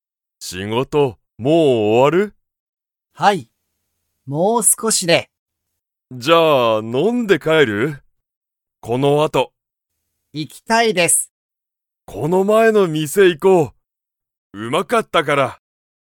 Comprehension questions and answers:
藤木(ふじき)さんと高橋(たかはし)さんは、この後(あと)____。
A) 飲(の)んで帰(かえ)る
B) あまり食(た)べない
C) 仕事(しごと)が終(お)わらない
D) 家(いえ)に行(い)きたい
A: 飲(の)んで帰(かえ)る

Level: Level 1

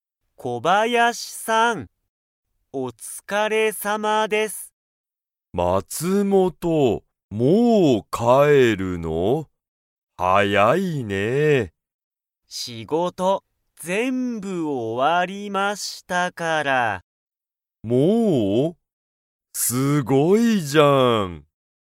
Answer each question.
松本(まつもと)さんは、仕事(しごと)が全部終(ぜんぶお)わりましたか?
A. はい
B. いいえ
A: はい

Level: Level 1

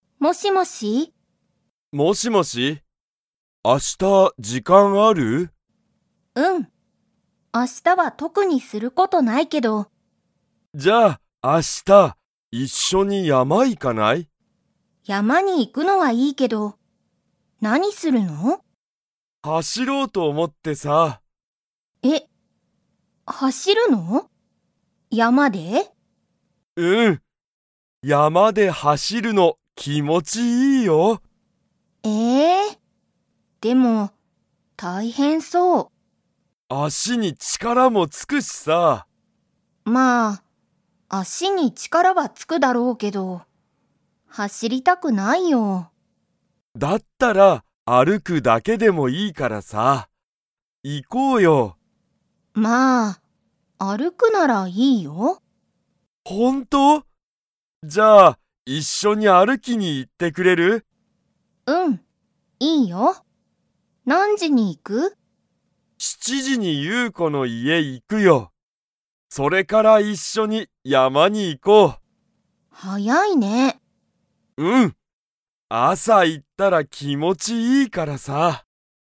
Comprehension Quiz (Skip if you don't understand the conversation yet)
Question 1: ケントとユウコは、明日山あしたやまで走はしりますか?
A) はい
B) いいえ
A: いいえ

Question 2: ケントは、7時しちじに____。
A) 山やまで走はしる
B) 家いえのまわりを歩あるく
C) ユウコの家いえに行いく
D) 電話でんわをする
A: ユウコの家いえに行いく

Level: Level 2

